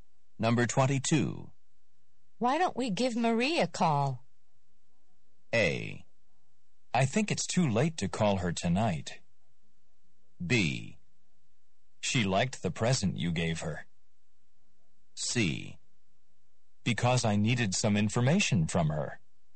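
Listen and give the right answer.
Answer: A: I think it's too late to call her tonight.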